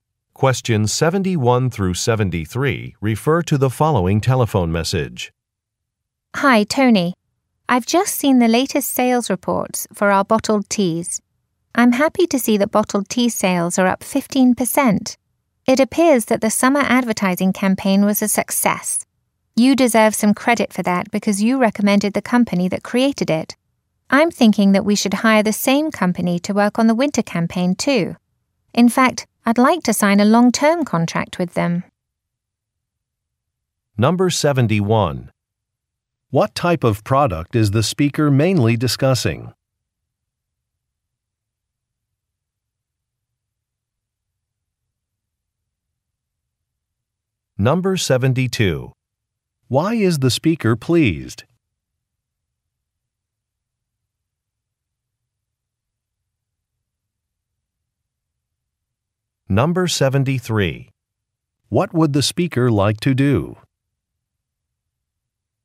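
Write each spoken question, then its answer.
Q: What type of product is the speaker mainly discussing?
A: Bottled tea

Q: Why is the speaker pleased?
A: Sales increased

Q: What would the speaker like to do?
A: Sign a long-term contract with the company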